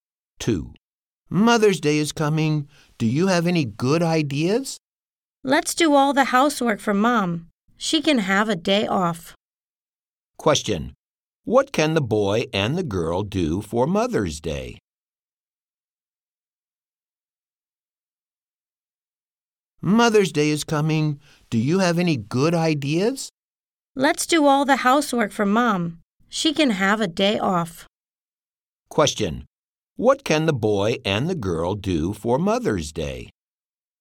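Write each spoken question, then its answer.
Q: Question, what can the boy and the girl do for Mother's Day?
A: Do all the housework for Mom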